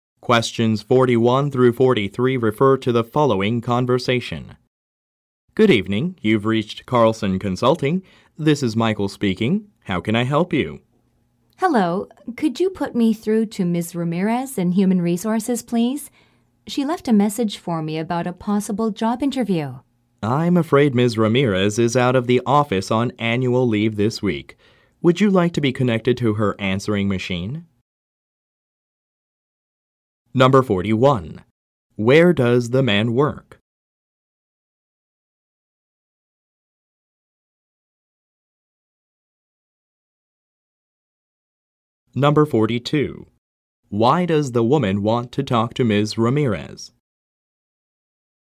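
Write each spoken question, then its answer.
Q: Where does the man work?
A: At Carlson Consulting

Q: Why does the woman want to talk to Ms. Ramirez?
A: About a possible job interview

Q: What does the man offer to do?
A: Connect her to Ms. Ramirez's answering machine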